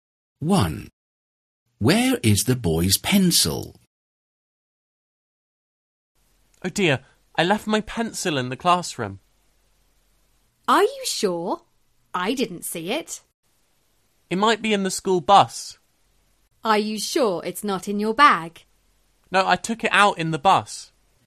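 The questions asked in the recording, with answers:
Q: Where is the boy's pencil?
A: On the school bus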